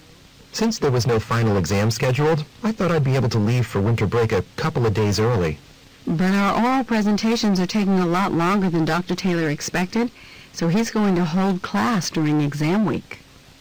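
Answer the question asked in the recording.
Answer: She won't be able to leave early for winter break.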